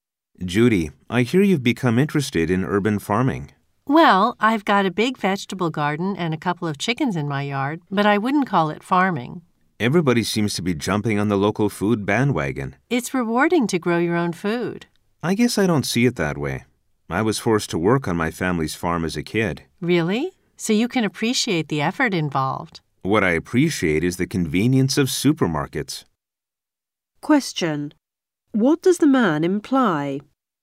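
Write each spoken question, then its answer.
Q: What does the man imply?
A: He isn't interested in growing his own food; he prefers buying food at supermarkets.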